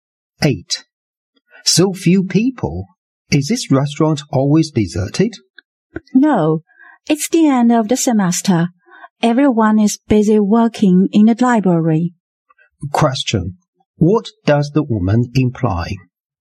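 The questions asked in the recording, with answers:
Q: What does the woman imply?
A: Students are busy studying in the library at the end of the semester.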